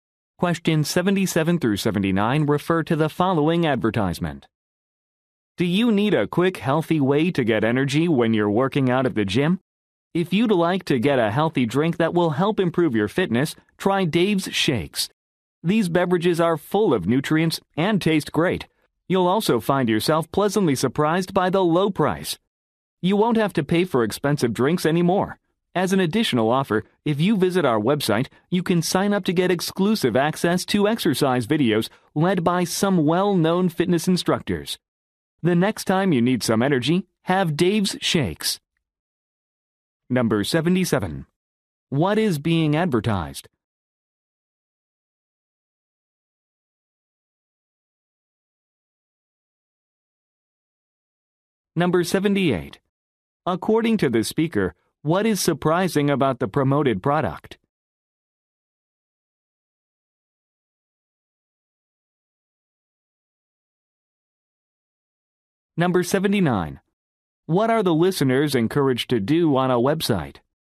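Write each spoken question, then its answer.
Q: What is being advertised?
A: Healthy drinks (Dave's Shakes)

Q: According to the speaker, what is surprising about the promoted product?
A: Its low price

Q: What are the listeners encouraged to do on a website?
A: Sign up for exclusive access to exercise videos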